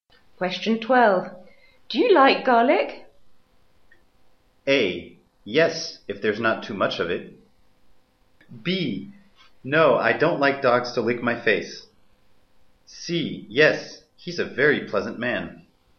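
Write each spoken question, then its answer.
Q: Do you like garlic?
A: A: Yes, if there's not too much of it.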